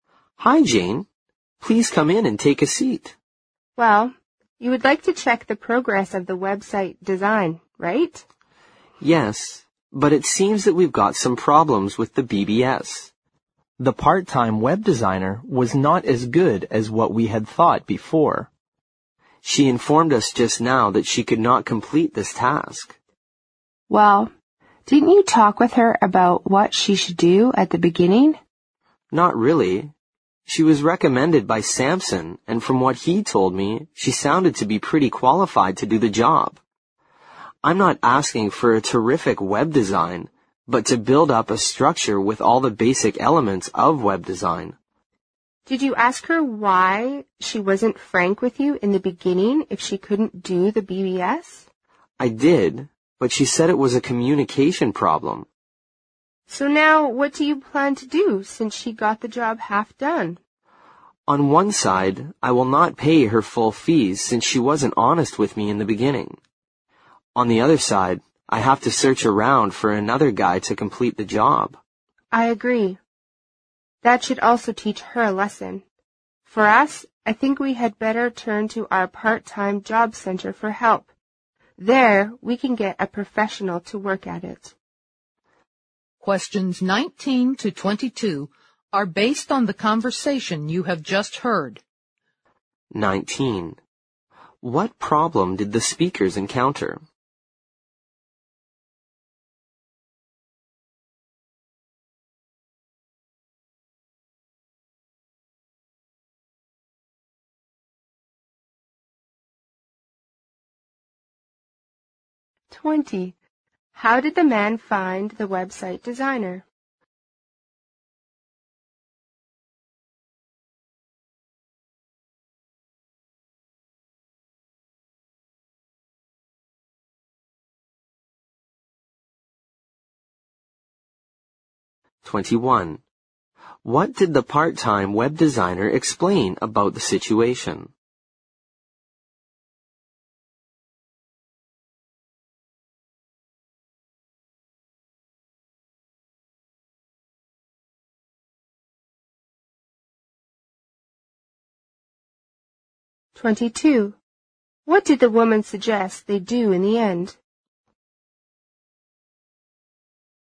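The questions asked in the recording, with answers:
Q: What problem did the speakers encounter?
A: The part-time web designer couldn't complete the BBS part of the website.

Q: How did the man find the website designer?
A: She was recommended by Samson.

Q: What did the part-time web designer explain about the situation?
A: She said it was a communication problem.

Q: What did the woman suggest they do in the end?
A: Turn to their part-time job center for a professional.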